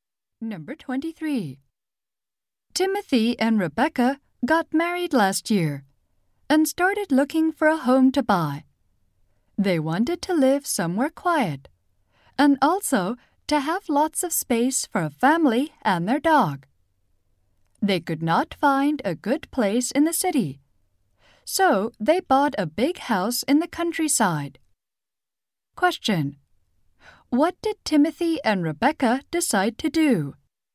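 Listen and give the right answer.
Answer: Buy a big house in the countryside.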